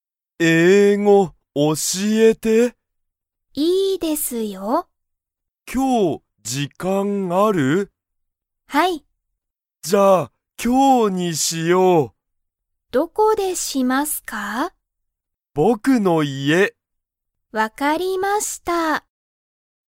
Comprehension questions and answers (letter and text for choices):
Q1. たくみとさつきは、____に行(い)く。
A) たくみの家(いえ)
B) さつきの家(いえ)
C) たくみの学校(がっこう)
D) さつきの学校(がっこう)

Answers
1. A) たくみの家(いえ)

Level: Level 1